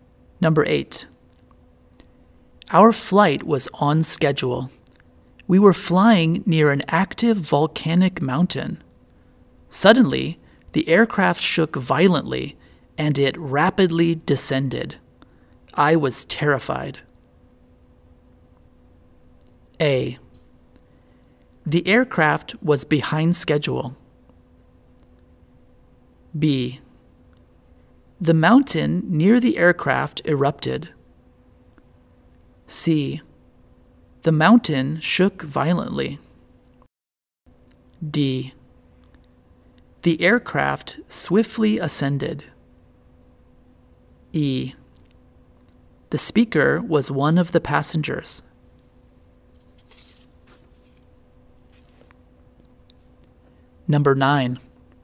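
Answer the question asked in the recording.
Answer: E: The speaker was one of the passengers.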